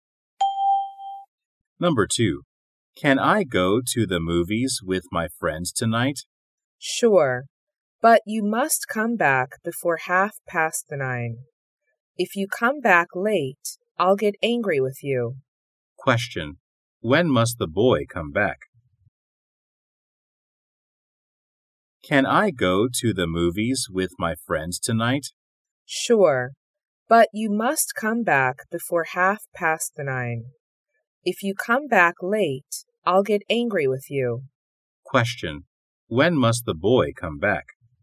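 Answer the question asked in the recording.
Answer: Before 9:30.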